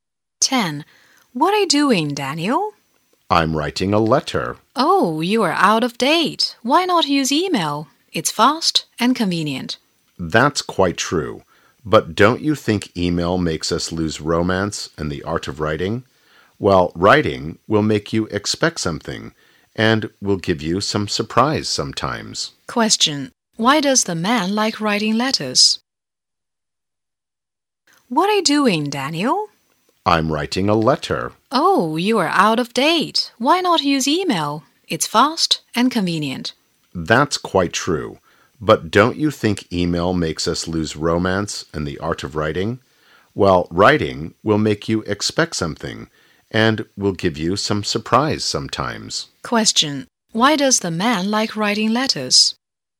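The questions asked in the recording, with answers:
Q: Why does the man like writing letters?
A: Writing makes him expect something and sometimes gives him a surprise.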